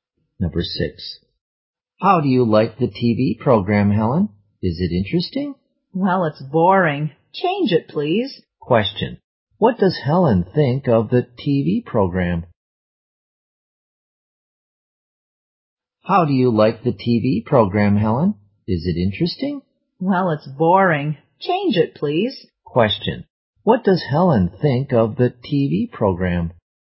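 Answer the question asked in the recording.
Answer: Boring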